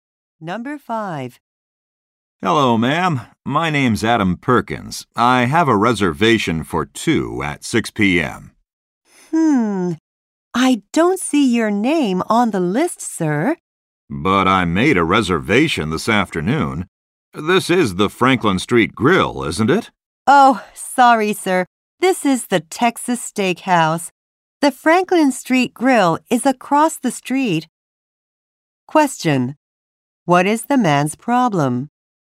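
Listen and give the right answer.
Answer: He went to the wrong restaurant.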